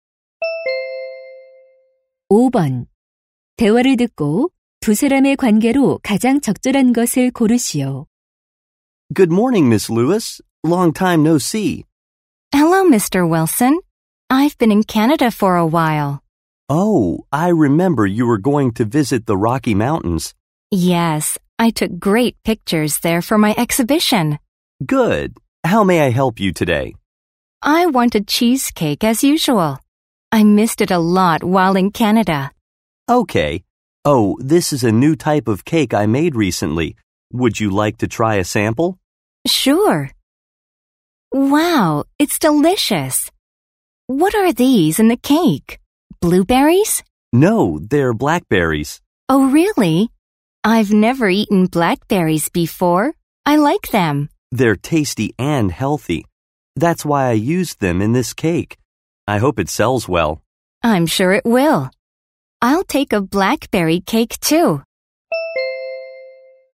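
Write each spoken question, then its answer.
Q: 대화를 듣고 두 사람의 관계로 가장 적절한 것을 고르시오.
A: 사진작가 - 제과점 주인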